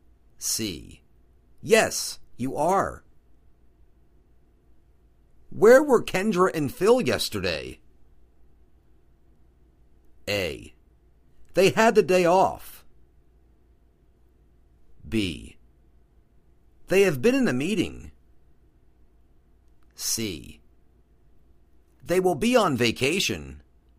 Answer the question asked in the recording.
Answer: They had the day off.